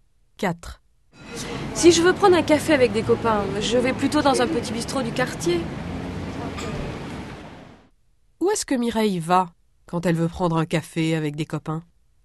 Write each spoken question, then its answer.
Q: Où est-ce que Mireille va quand elle veut prendre un café avec des copains?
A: Dans un petit bistrot du quartier.